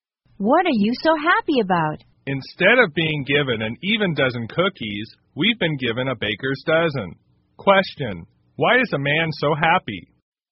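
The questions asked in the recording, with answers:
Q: Question, why is a man so happy?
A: They got 13 cookies instead of 12.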